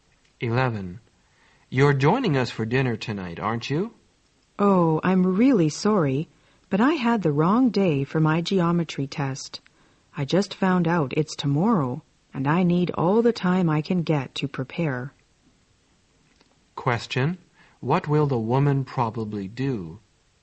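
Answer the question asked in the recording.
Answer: Skip dinner and study for her geometry test.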